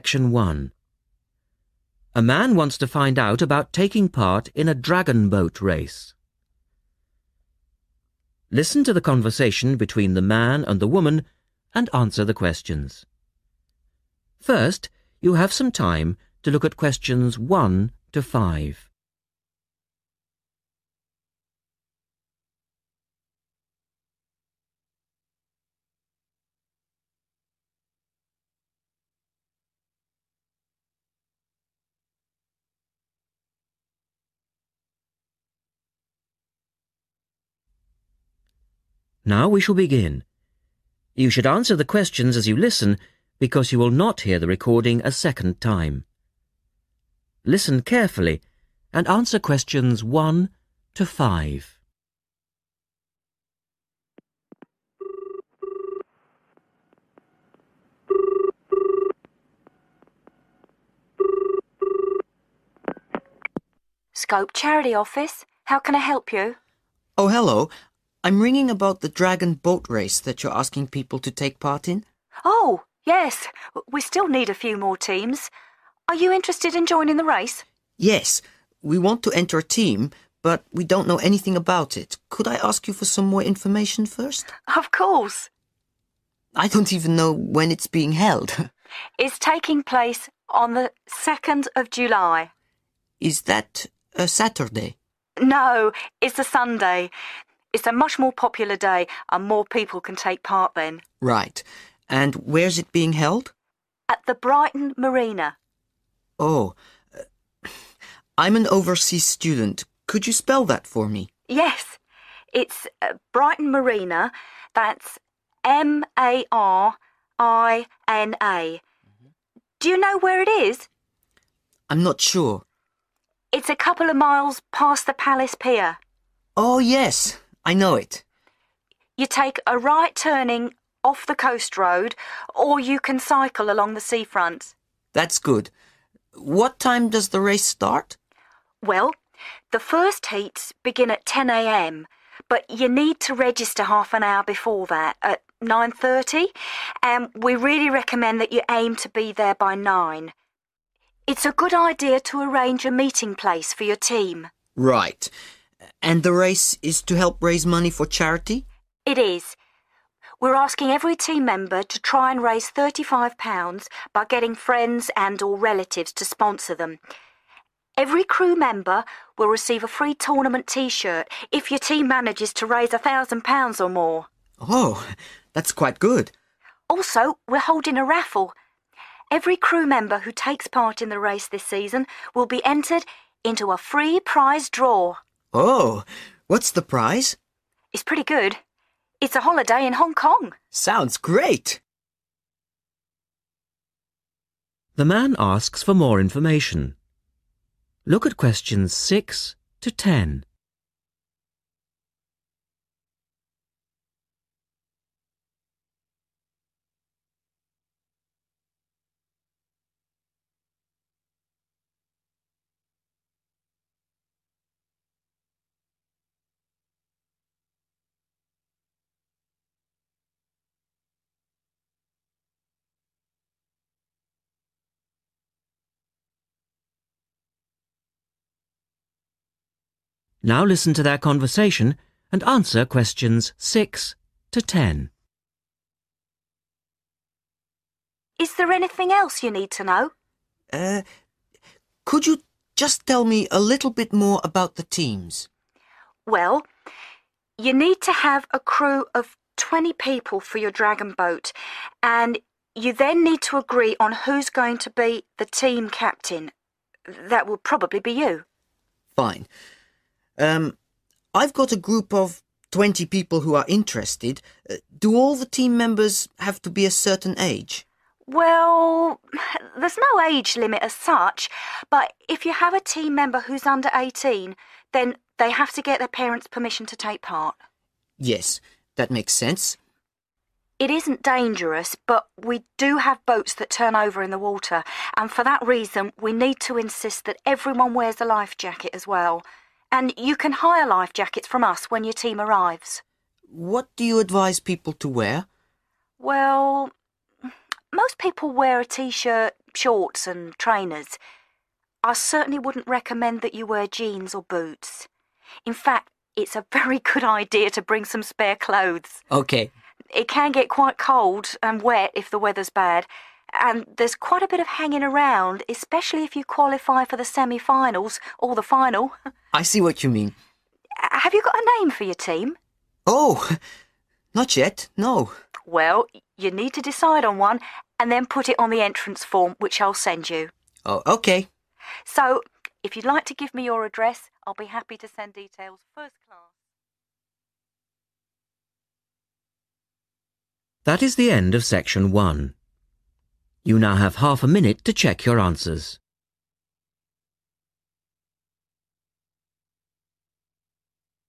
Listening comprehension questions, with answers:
Complete the notes below. Write NO MORE THAN THREE WORDS AND/OR A NUMBER for each answer.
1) Day and date: (1).................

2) Place: Brighton (2).................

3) Registration time: (3).................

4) Aim to raise over (4)................. as a team and get a free t-shirt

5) Free Prize Draw for trip to (5).................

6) Must have crew of 20 and elect a (6).................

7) Under 18s need to have (7)................. to enter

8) Need to hire (8).................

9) Advised to bring extra (9).................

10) Must choose a (10).................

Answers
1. Sunday 2 July
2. MARINA
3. 9.30 am
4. £1000
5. Hong Kong
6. (team) captain
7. parents' permission
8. (20) life jackets
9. clothes
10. name